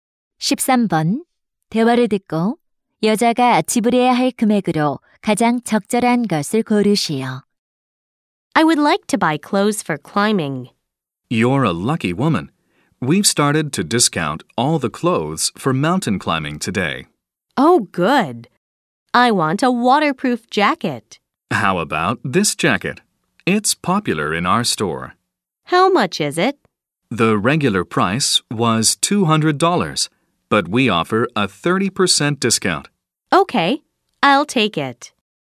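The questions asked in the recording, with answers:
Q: 대화를 듣고 여자가 지불해야 할 금액으로 가장 적절한 것을 고르시오.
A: 140달러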